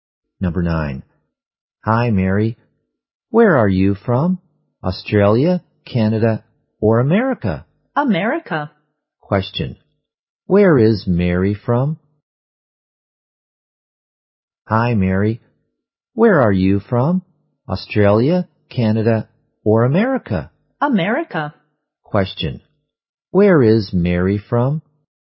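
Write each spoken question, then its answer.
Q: Where is Mary from?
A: America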